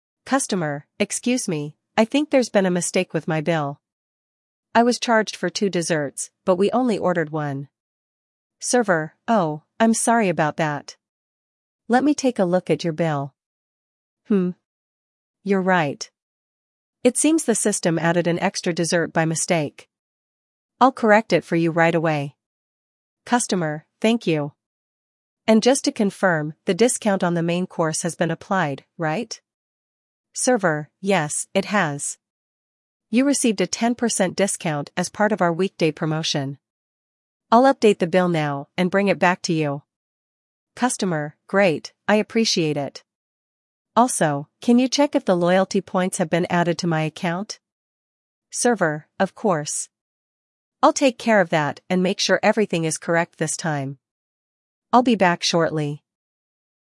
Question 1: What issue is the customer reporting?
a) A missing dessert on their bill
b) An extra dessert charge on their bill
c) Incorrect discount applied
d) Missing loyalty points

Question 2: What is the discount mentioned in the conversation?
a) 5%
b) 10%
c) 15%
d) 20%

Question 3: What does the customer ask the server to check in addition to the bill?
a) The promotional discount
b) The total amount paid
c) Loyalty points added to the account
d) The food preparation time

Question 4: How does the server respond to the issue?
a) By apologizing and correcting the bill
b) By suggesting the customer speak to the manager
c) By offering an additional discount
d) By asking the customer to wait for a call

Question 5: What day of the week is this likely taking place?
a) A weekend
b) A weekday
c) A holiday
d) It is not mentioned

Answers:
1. b
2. b
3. c
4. a
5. b

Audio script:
Customer: Excuse me, I think there's been a mistake with my bill. I was charged for two desserts, but we only ordered one.
Server: Oh, I'm sorry about that. Let me take a look at your bill. Hmm... you're right. It seems the system added an extra dessert by mistake. I'll correct it for you right away.
Customer: Thank you. And just to confirm, the discount on the main course has been applied, right?
Server: Yes, it has. You received a 10% discount as part of our weekday promotion. I'll update the bill now and bring it back to you.
Customer: Great, I appreciate it. Also, can you check if the loyalty points have been added to my account?
Server: Of course. I'll take care of that and make sure everything is correct this time. I'll be back shortly.

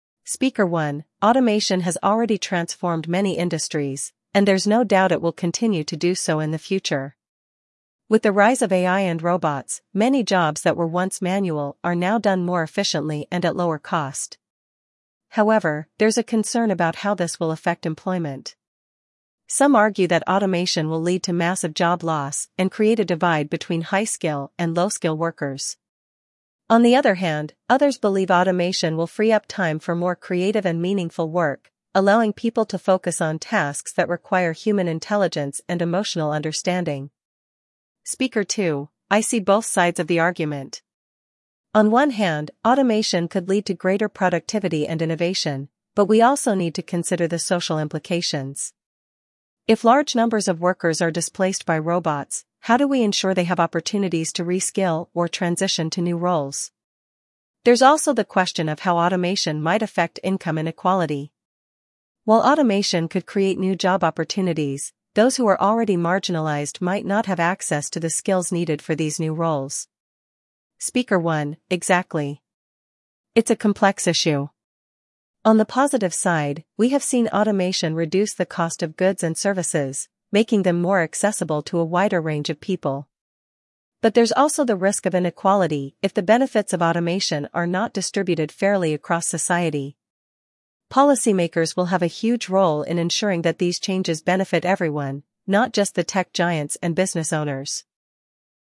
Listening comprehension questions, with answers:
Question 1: What is the primary concern about automation according to Speaker 1?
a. Increased costs for consumers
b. Job loss and skill divide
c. Better quality of goods and services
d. Improved wages for workers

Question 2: What does Speaker 2 say about automation?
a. It will lead to a reduction in worker skills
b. It will help reduce the gap between rich and poor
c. It will improve creativity in the workforce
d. It may create social problems if not managed well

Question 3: What do both speakers agree on regarding automation's impact?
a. It will be beneficial for workers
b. It could lead to inequality if not addressed properly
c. It will create significant new job opportunities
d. It will reduce product costs for consumers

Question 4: What does Speaker 1 believe is one positive aspect of automation?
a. Increased unemployment rates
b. Reduced cost of goods and services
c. Job creation for low-skill workers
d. Less innovation in technology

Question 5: According to Speaker 2, what issue needs to be addressed for displaced workers?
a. Tax breaks for businesses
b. Access to re-skilling or transition to new roles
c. Longer work hours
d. Subsidized wages for new jobs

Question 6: What is the role of policymakers in the future of automation, as discussed by Speaker 1?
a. They should limit technological advancements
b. They should help ensure the benefits of automation are shared fairly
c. They should promote high-skill jobs only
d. They should regulate the prices of goods and services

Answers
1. b
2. d
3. b
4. b
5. b
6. b

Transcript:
Speaker 1: "Automation has already transformed many industries, and there's no doubt it will continue to do so in the future. With the rise of AI and robots, many jobs that were once manual are now done more efficiently and at lower cost. However, there's a concern about how this will affect employment. Some argue that automation will lead to massive job loss and create a divide between high-skill and low-skill workers. On the other hand, others believe automation will free up time for more creative and meaningful work, allowing people to focus on tasks that require human intelligence and emotional understanding."
Speaker 2: "I see both sides of the argument. On one hand, automation could lead to greater productivity and innovation, but we also need to consider the social implications. If large numbers of workers are displaced by robots, how do we ensure they have opportunities to re-skill or transition to new roles? There's also the question of how automation might affect income inequality. While automation could create new job opportunities, those who are already marginalized might not have access to the skills needed for these new roles."
Speaker 1: "Exactly. It's a complex issue. On the positive side, we have seen automation reduce the cost of goods and services, making them more accessible to a wider range of people. But there's also the risk of inequality if the benefits of automation are not distributed fairly across society. Policymakers will have a huge role in ensuring that these changes benefit everyone, not just the tech giants and business owners."

